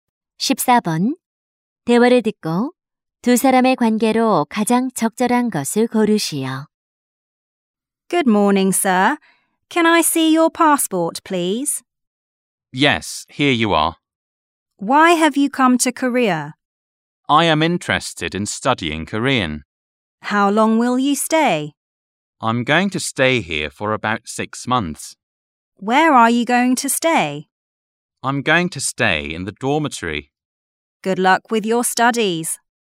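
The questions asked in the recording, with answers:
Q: 대화를 듣고 두 사람의 관계로 가장 적절한 것을 고르시오.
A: 입국 심사관과 여행자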